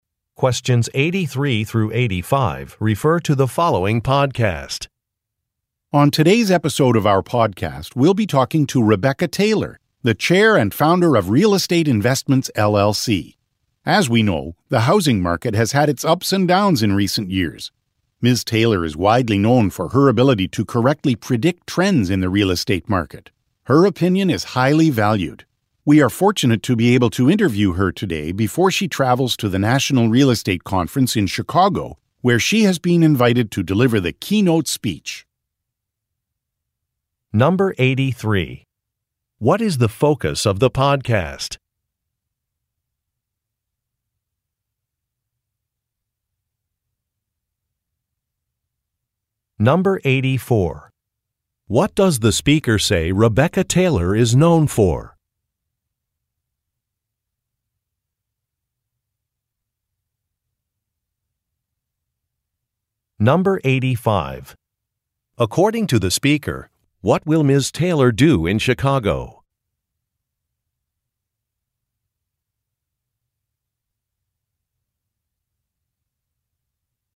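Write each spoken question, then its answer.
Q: What does the speaker say Rebecca Taylor is known for?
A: Correctly predicting trends in the real estate market

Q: According to the speaker, what will Ms. Taylor do in Chicago?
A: Deliver the keynote speech at the National Real Estate Conference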